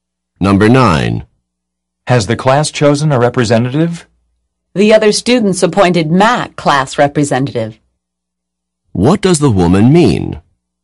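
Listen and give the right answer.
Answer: Matt was appointed class representative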